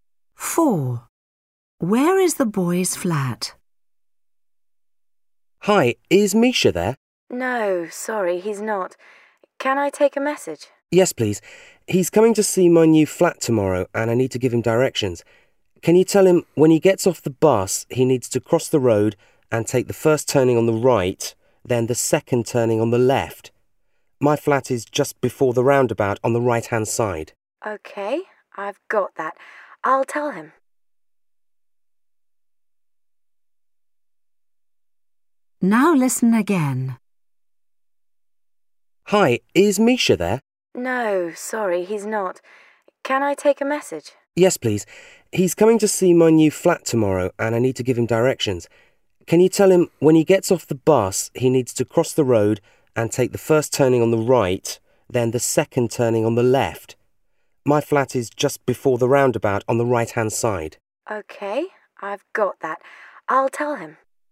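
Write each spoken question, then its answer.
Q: Where is the boy's flat?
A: On the right, just before the roundabout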